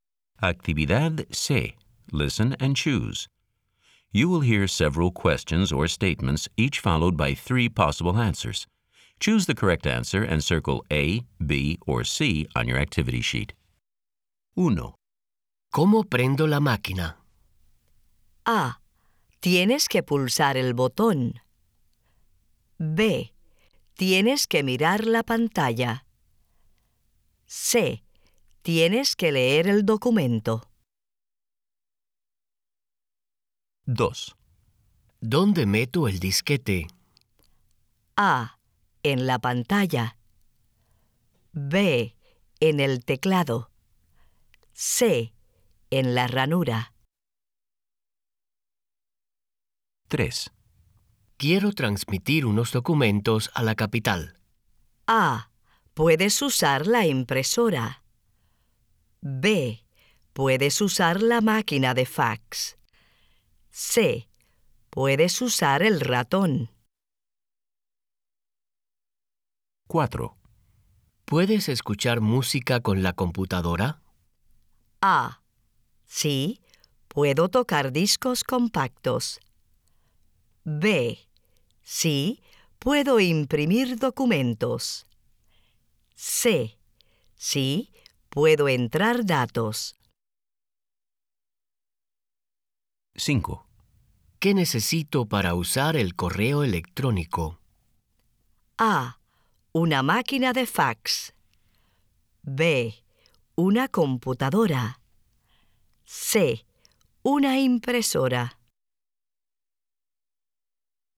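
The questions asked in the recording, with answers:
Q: ¿Cómo prendo la máquina?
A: A: Tienes que pulsar el botón.

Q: ¿Dónde meto el disquete?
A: C: En la ranura.

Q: Quiero transmitir unos documentos a la capital.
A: B: Puedes usar la máquina de fax.

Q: ¿Puedes escuchar música con la computadora?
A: A: Sí, puedo tocar discos compactos.

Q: ¿Qué necesito para usar el correo electrónico?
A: B: Una computadora.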